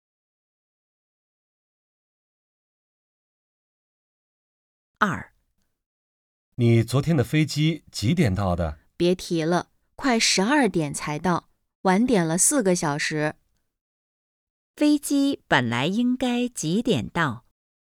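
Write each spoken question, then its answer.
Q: 飞机本来应该几点到?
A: 快8点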